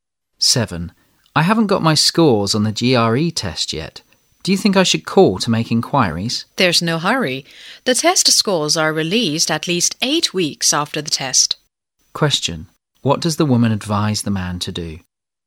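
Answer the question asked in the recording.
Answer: Wait, since the scores come out at least 8 weeks after the test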